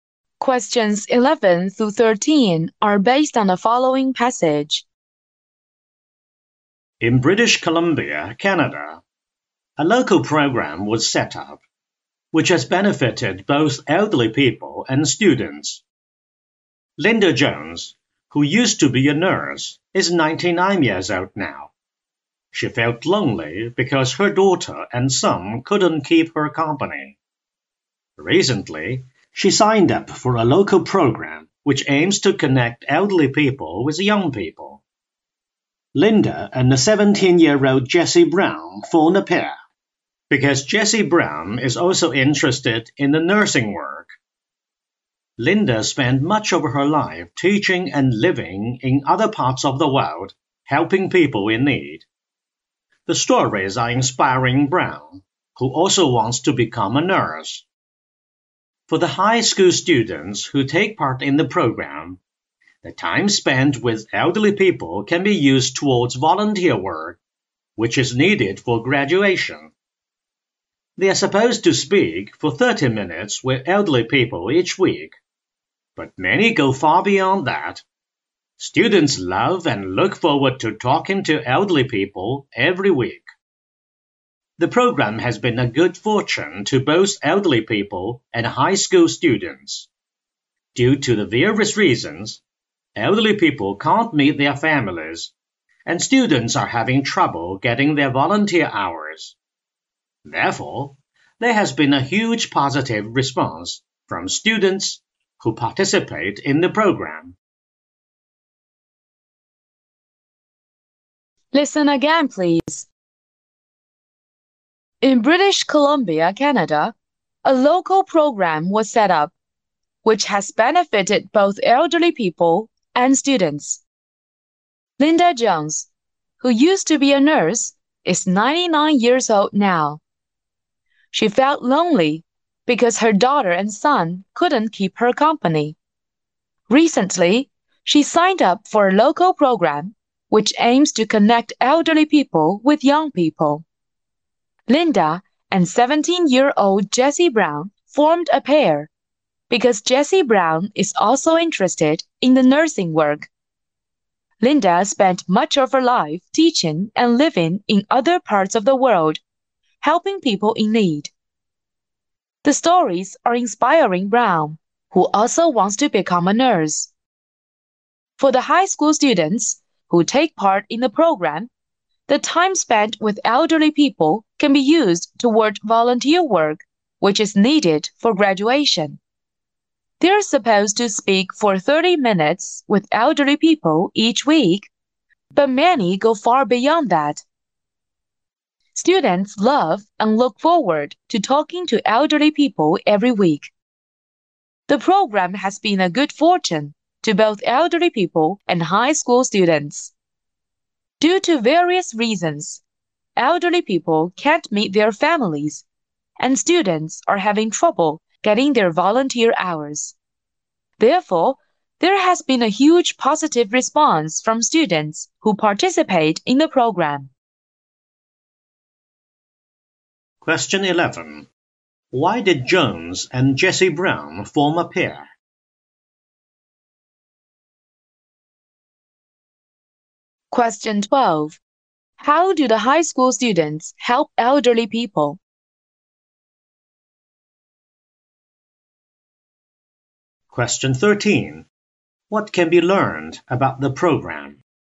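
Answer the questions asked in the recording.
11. Both are interested in nursing
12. By talking with them every week
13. It benefits both elderly people and students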